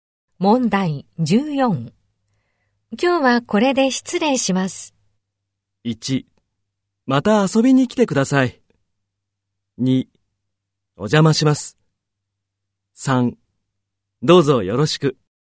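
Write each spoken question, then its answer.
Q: 今日はこれで失礼します。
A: 1: また遊びに来てください。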